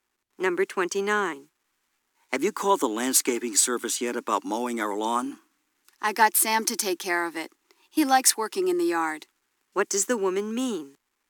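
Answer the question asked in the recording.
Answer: Sam will mow the lawn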